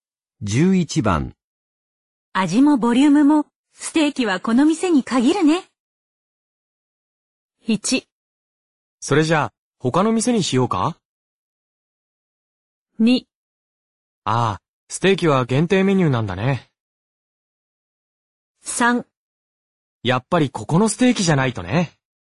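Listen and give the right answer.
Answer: 3: やっぱりここのステーキじゃないとね。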